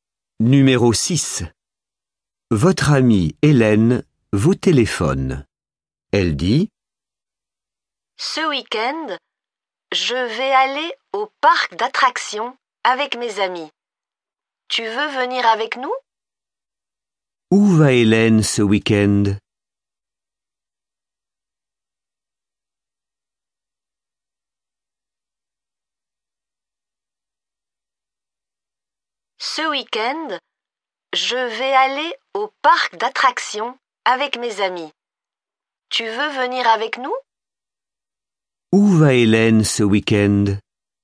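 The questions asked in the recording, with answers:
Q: Où va Hélène ce week-end?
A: Au parc d'attractions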